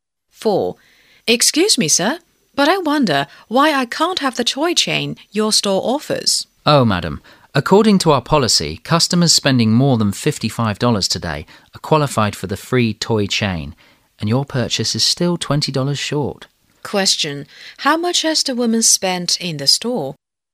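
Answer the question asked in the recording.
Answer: $35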